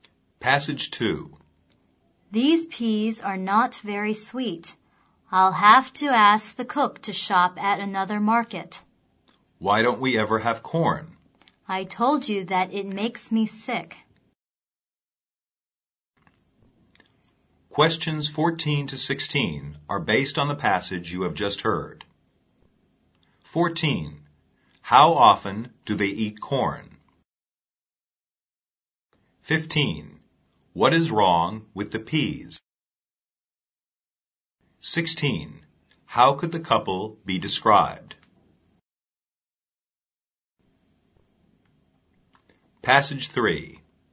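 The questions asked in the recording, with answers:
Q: How often do they eat corn?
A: Never

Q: What is wrong with the peas?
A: They are not very sweet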